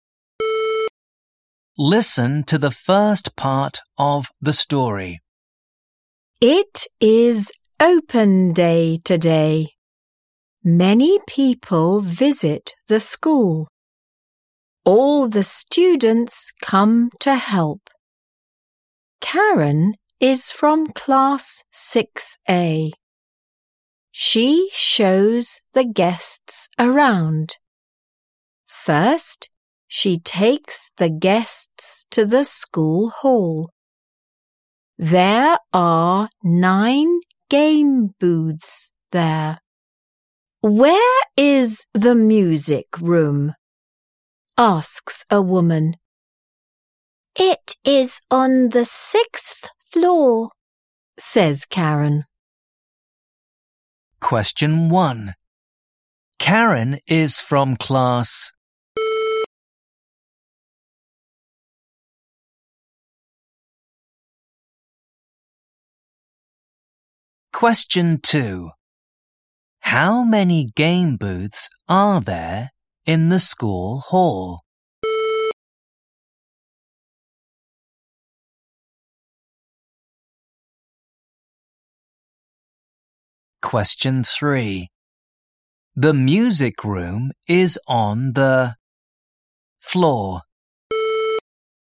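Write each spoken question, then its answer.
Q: Karen is from class...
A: 6A

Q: The music room is on the floor.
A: 6th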